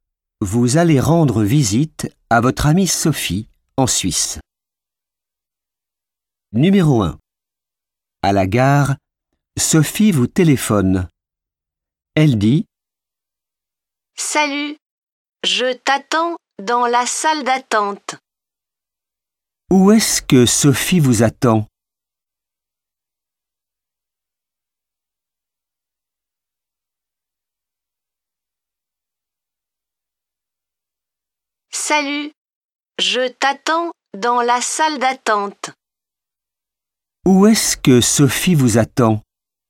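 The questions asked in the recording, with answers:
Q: Où est-ce que Sophie vous attend?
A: dans la salle d'attente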